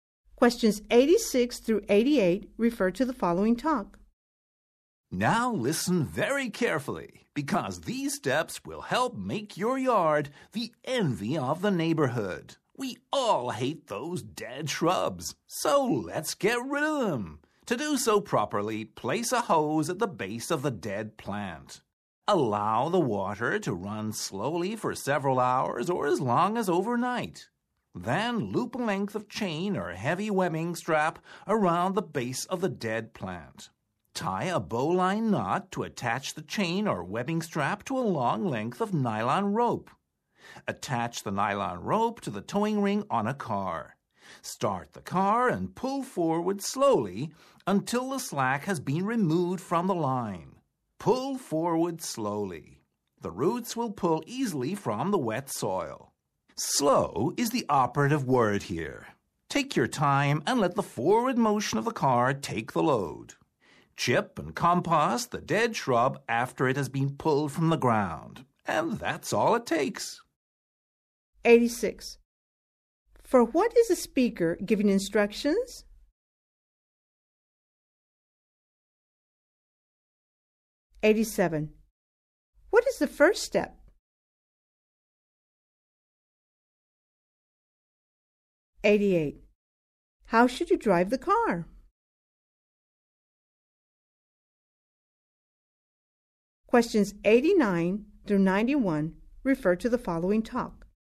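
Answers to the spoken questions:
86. Removing dead shrubs
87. Place a hose at the base of the plant and let water run slowly
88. Slowly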